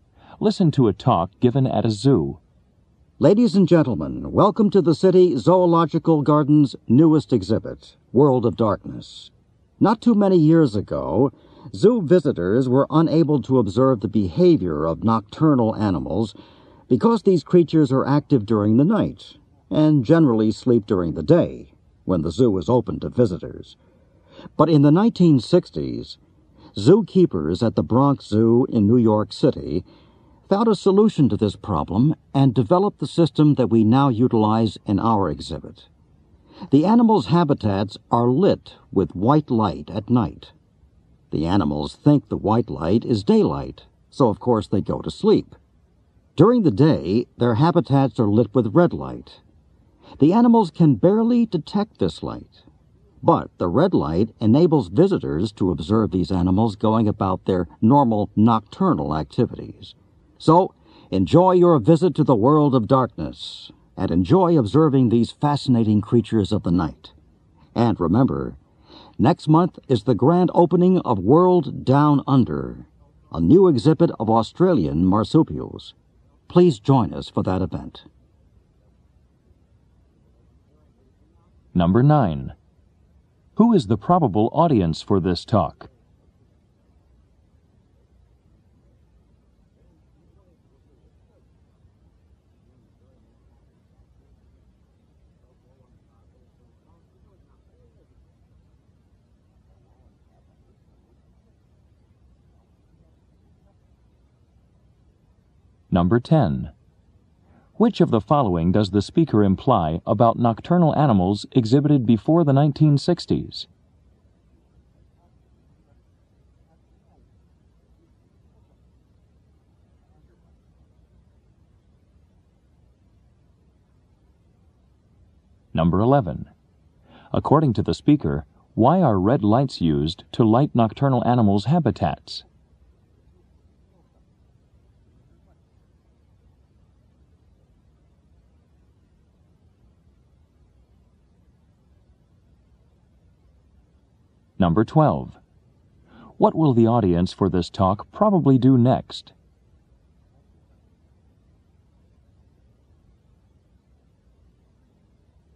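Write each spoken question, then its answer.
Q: Who is the probable audience for this talk?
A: Zoo visitors

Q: Which of the following does the speaker imply about nocturnal animals exhibited before the 1960s?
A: Visitors couldn't observe their behavior because they slept during the day

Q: According to the speaker, why are red lights used to light nocturnal animals' habitats?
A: The animals can barely detect it, so they stay active and visitors can watch them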